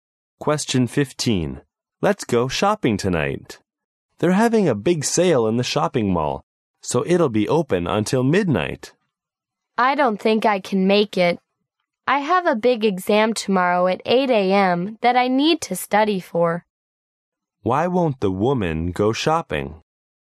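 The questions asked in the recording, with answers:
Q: Why won't the woman go shopping?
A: She has to study for a big exam tomorrow at 8 a.m.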